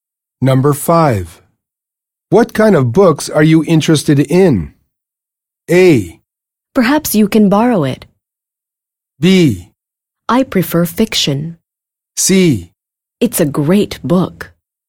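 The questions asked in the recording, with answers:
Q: What kind of books are you interested in?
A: B: I prefer fiction.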